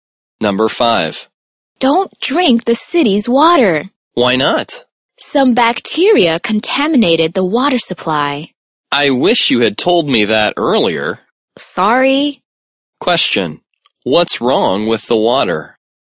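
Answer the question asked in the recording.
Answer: Bacteria contaminated the water supply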